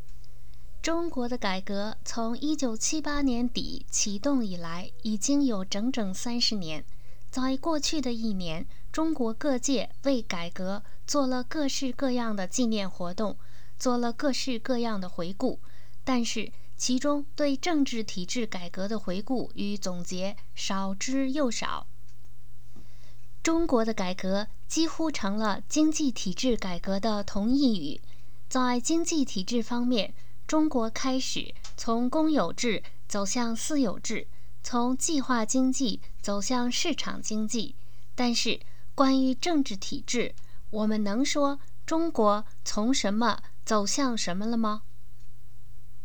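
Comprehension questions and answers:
Please answer the following questions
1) What changes have occurred to China's economic system during the 30 years of its reform?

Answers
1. From public ownership to private ownership, and from a planned economy to a market economy

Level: M.Phil Year 2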